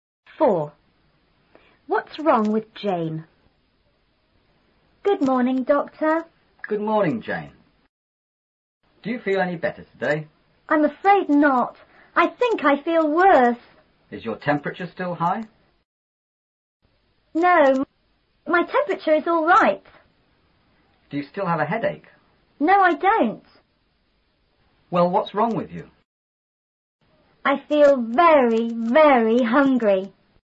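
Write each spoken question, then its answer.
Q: What's wrong with Jane?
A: She feels very, very hungry.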